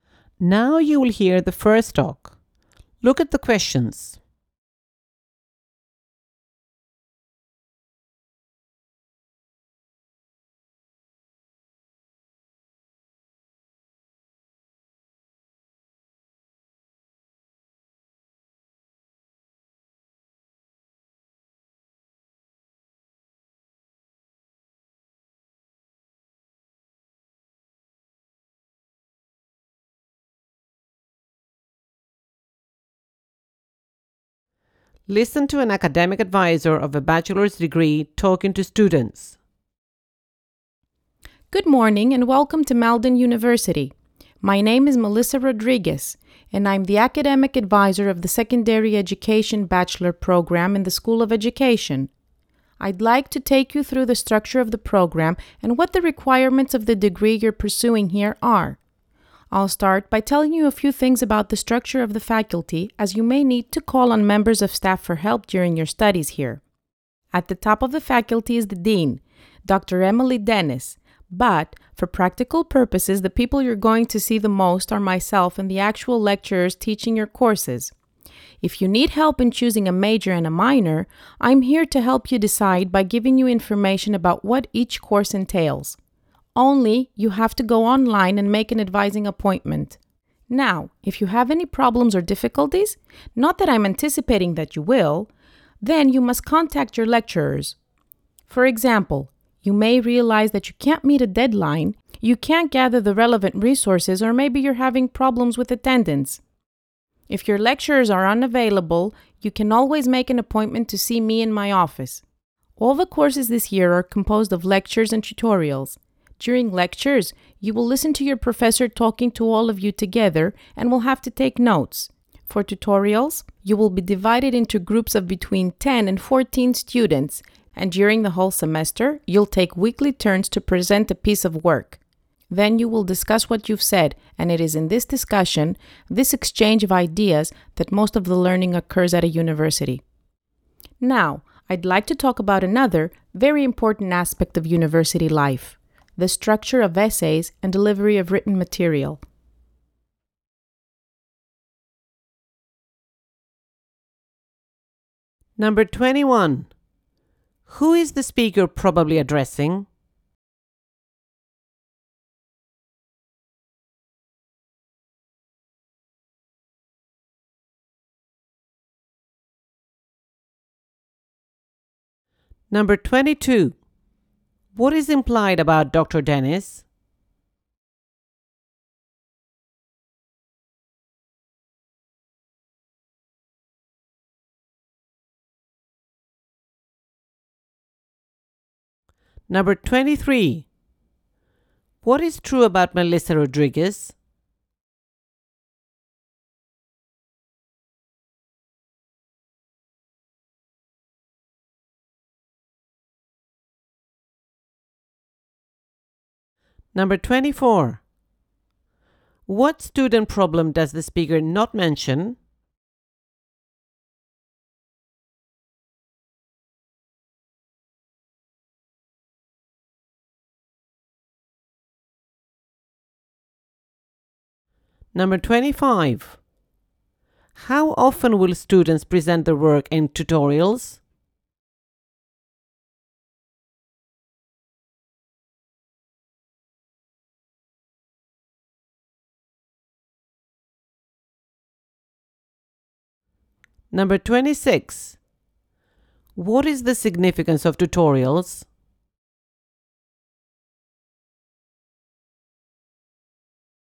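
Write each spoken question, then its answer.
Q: Who is the speaker probably addressing?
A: New students in the Secondary Education Bachelor Program

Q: How often will students present their work in tutorials?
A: In weekly turns during the semester

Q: What is the significance of tutorials?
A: Most learning happens in their discussion and exchange of ideas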